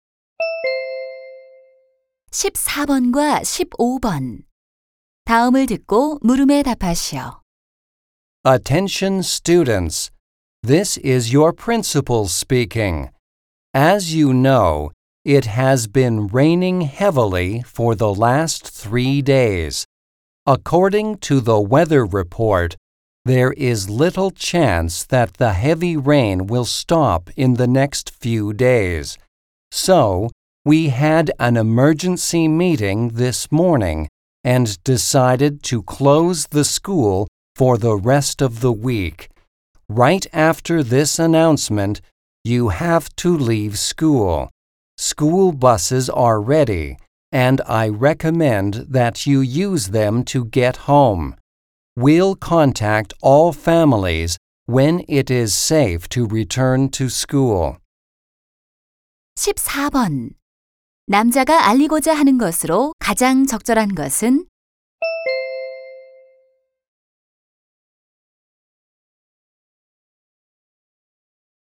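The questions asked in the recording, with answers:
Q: 남자가 알리고자 하는 것으로 가장 적절한 것은?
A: 폭우로 인한 휴교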